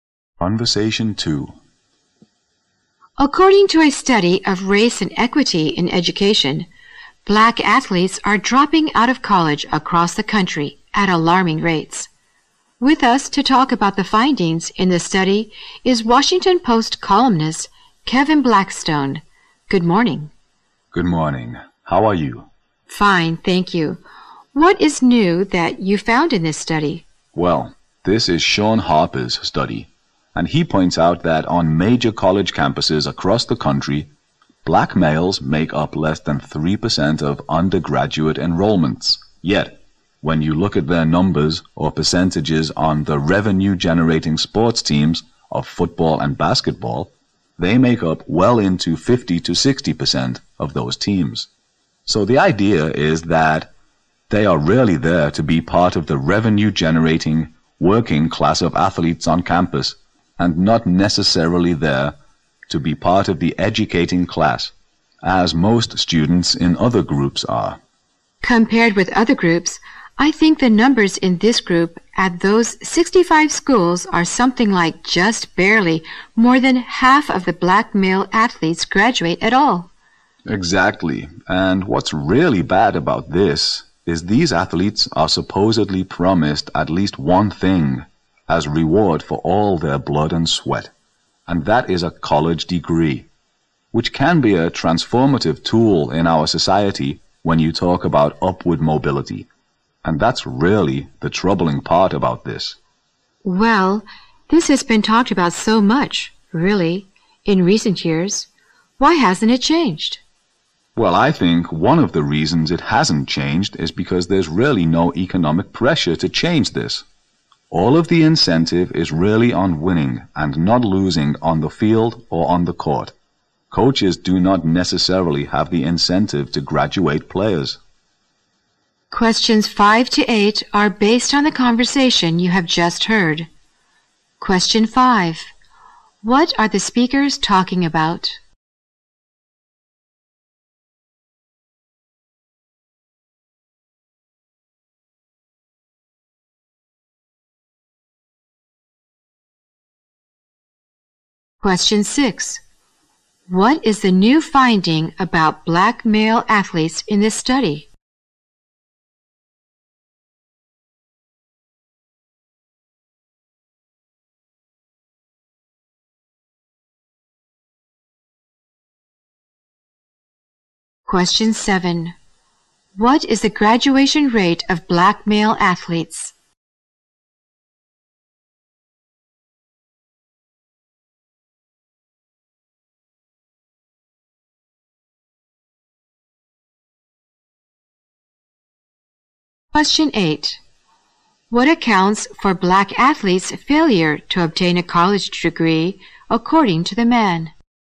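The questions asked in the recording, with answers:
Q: What are the speakers talking about?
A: Black athletes dropping out of college

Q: What is the new finding about black male athletes in this study?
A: They are under 3% of undergraduates but 50-60% of football and basketball teams

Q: What is the graduation rate of black male athletes?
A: Barely more than half

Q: What accounts for black athletes' failure to obtain a college degree, according to the man?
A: The focus on winning; there is no economic pressure or incentive to graduate them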